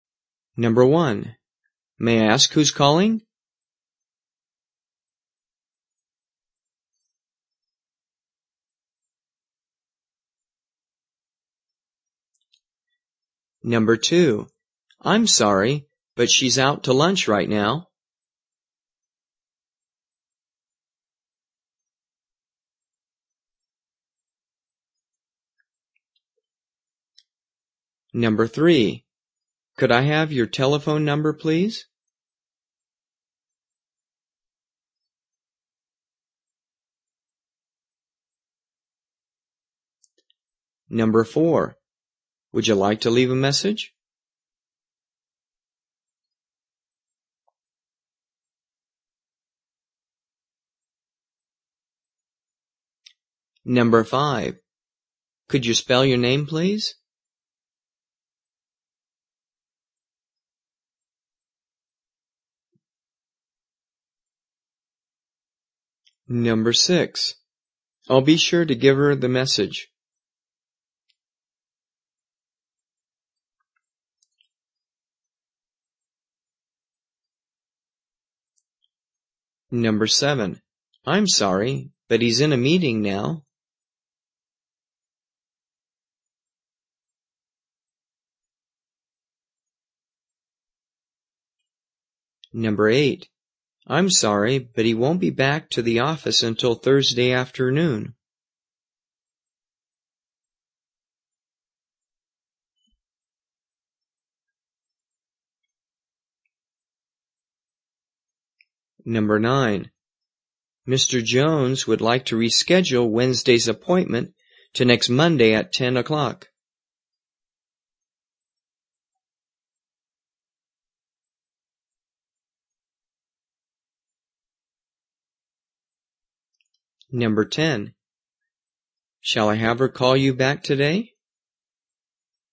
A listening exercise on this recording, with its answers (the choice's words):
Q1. May I ask ________________ calling?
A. Ms. Smith, please.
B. I'll call tomorrow.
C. This is Bob Hall.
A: This is Bob Hall.

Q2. I'm sorry, but she's out to ___________ right now.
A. Okay. I'll call her right now.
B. I'll call her after lunch.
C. Okay. Lunch time is fine.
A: I'll call her after lunch.

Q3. Could I have your ____________________?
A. Yes. It's 532-9843.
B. My name's Greg Rodgers.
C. My zip code is 09783.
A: Yes. It's 532-9843.

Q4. ___________________________________ message?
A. No. I'll call later.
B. Yes. Go ahead.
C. Yes. Please give him the message.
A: No. I'll call later.

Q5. Could ________________________________________ please?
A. I work for Sony.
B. It`s spelled T . . I . . M.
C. That's correct.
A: It`s spelled T . . I . . M.

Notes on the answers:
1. May I ask who's calling? (This is Bob Hall.)
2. I'm sorry, but she's out to lunch right now. (I'll call her after lunch.)
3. Could I have your telephone number, please? (Yes. It's 532-9843.)
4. Would you like to leave a message? (No. I'll call later.)
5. Could you spell your name, please? (It's spelled T . . I . . M.)

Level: 初级